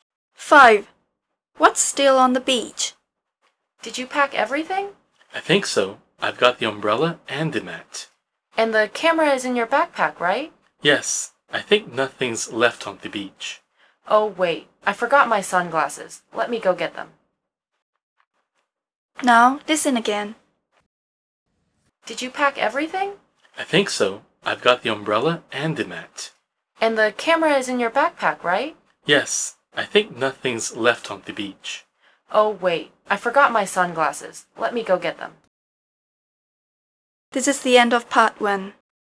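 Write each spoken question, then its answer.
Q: What's still on the beach?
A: Sunglasses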